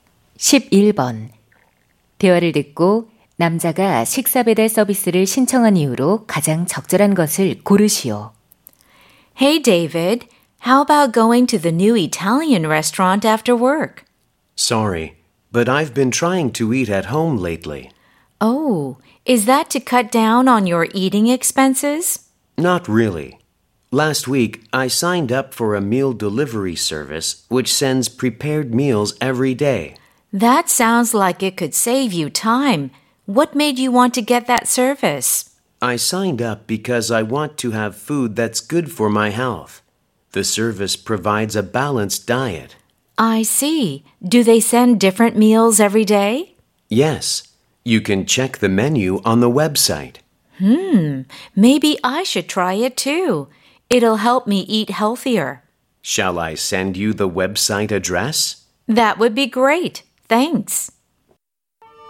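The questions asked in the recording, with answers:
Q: 대화를 듣고 남자가 식사 배달 서비스를 신청한 이유로 가장 적절한 것을 고르시오.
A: 건강에 좋은 음식을 먹고 싶어서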